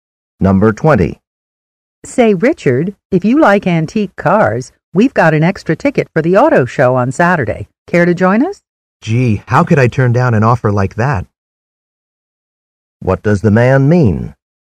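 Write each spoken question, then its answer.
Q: What does the man mean?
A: He would be glad to go to the auto show.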